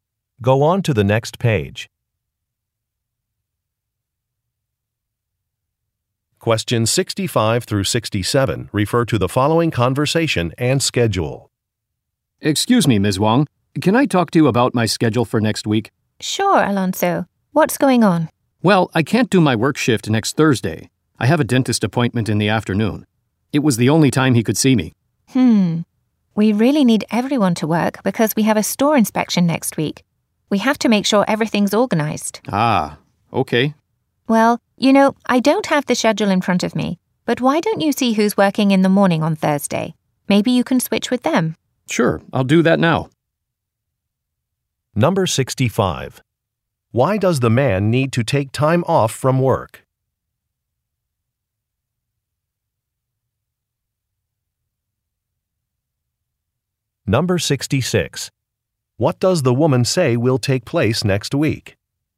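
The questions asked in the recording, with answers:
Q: Why does the man need to take time off from work?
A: He has a dentist appointment

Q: What does the woman say will take place next week?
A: A store inspection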